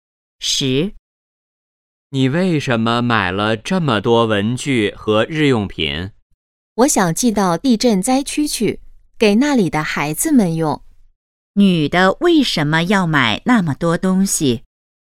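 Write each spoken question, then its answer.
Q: 女的为什么要买那么多东西?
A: 寄给地震灾区的孩子们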